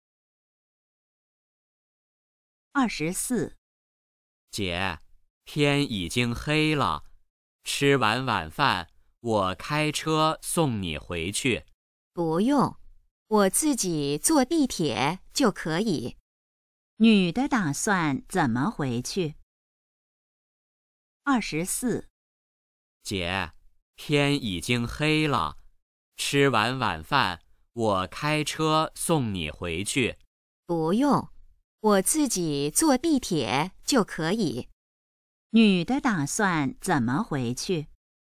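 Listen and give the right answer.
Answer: 坐地铁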